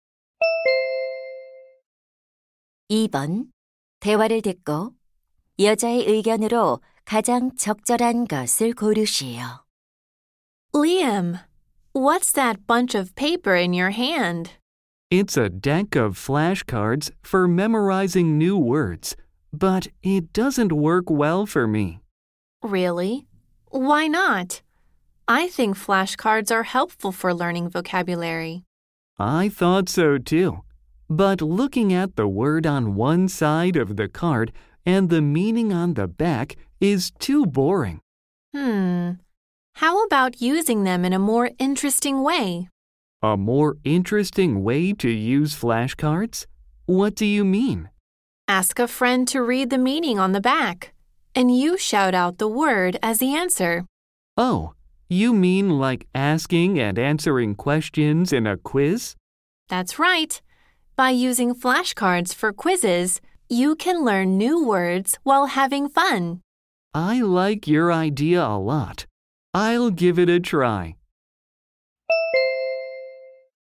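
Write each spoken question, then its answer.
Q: 대화를 듣고 여자의 의견으로 가장 적절한 것을 고르시오.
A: 플래시카드를 퀴즈처럼 활용하면 재미있게 단어를 학습할 수 있다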